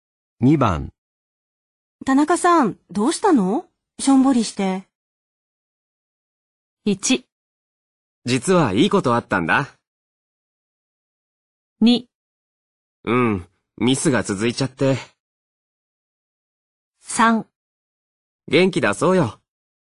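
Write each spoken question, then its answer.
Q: 田中さん、どうしたの?しょんぼりして。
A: 2: うん、ミスが続いちゃって。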